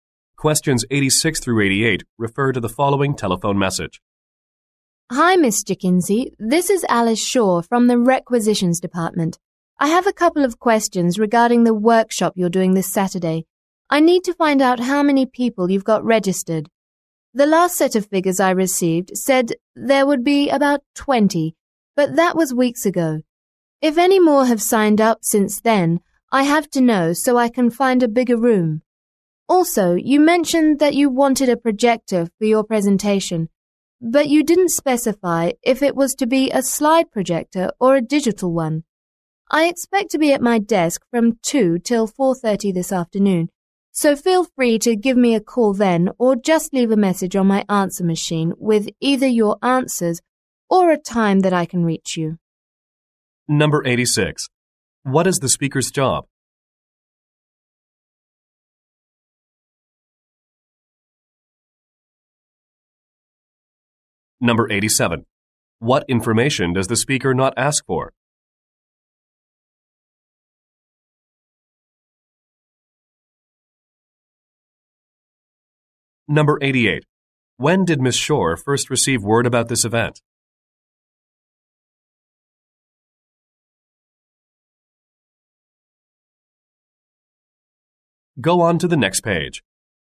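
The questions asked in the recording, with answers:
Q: What is the speaker's job?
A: She works in the Requisitions Department

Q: When did Ms. Shore first receive word about this event?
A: Weeks ago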